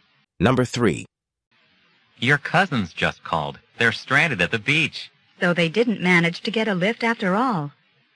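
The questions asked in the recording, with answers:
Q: What had the woman assumed about her cousins?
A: That they had gotten a ride home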